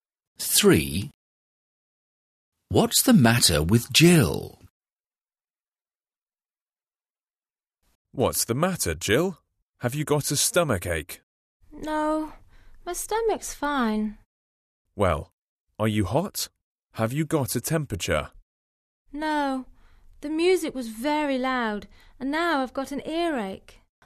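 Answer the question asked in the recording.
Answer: She has an earache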